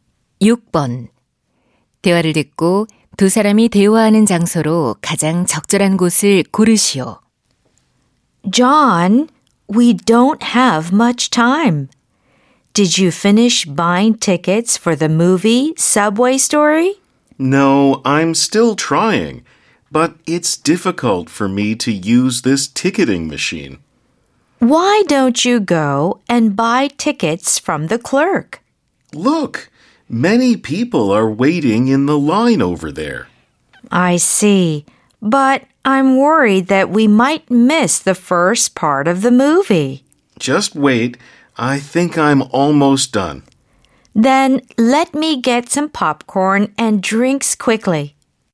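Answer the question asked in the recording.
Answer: 영화관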